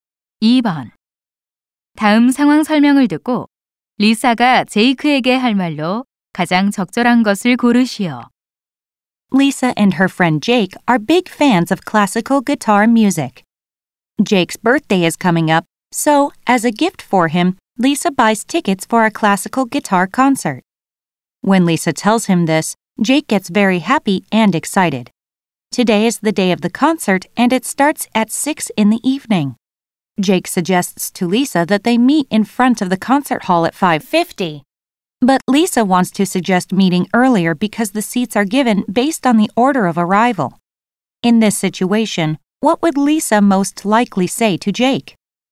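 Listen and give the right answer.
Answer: Why don't we meet earlier to get good seats?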